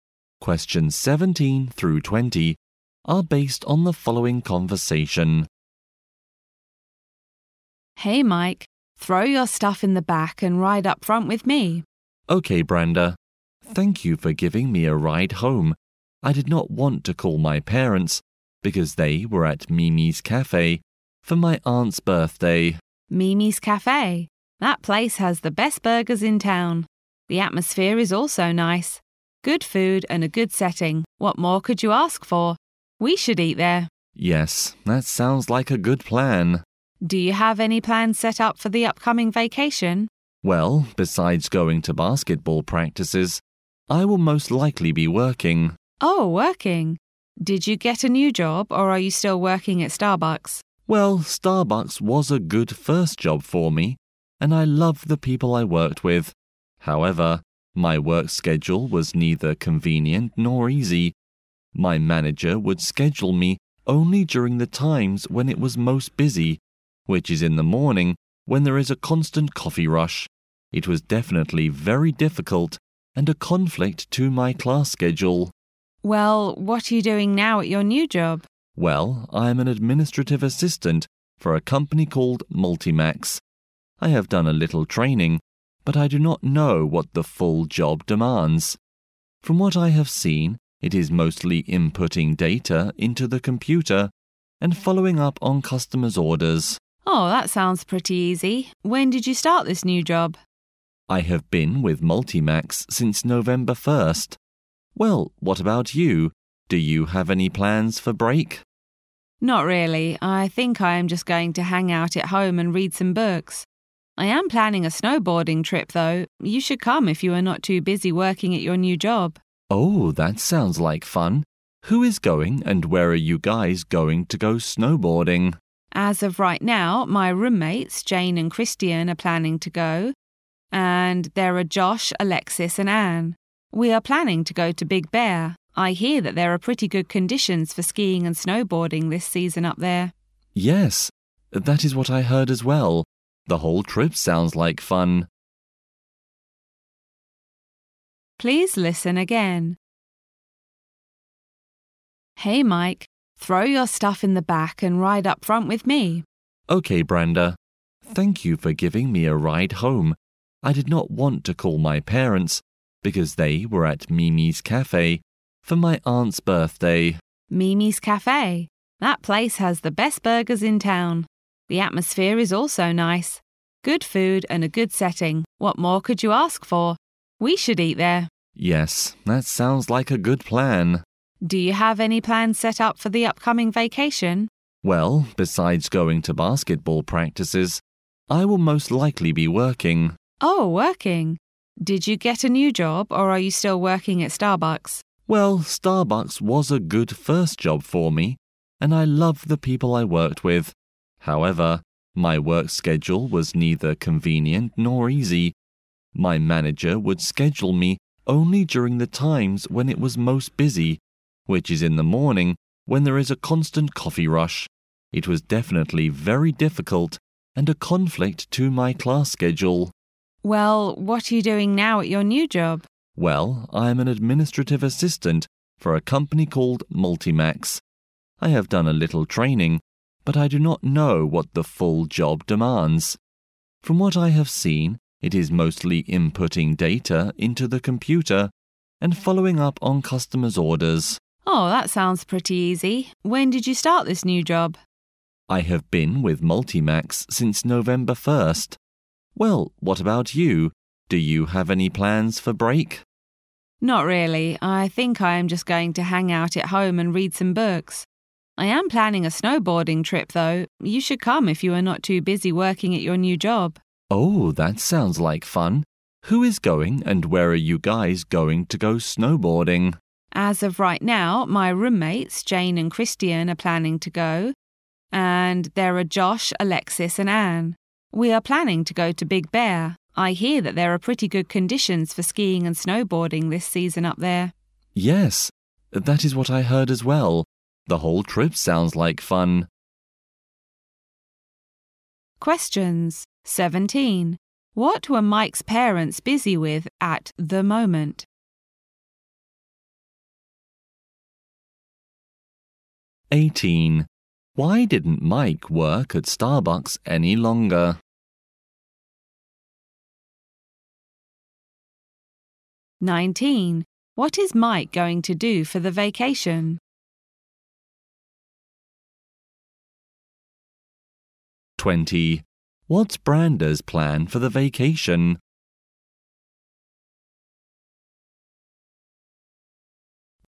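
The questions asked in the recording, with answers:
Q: What were Mike's parents busy with at the moment?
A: Celebrating his aunt's birthday at Mimi's Cafe

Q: Why didn't Mike work at Starbucks any longer?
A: The work schedule conflicted with his class schedule

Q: What is Mike going to do for the vacation?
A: Go to basketball practices and work

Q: What's Brenda's plan for the vacation?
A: Stay home reading and go snowboarding at Big Bear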